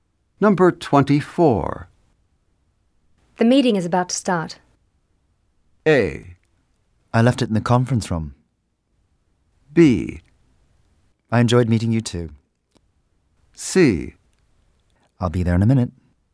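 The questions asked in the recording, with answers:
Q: The meeting is about to start.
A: C: I'll be there in a minute.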